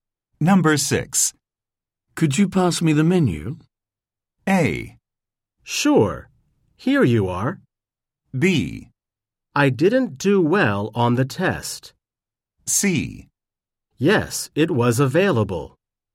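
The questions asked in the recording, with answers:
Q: Could you pass me the menu?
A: A: Sure. Here you are.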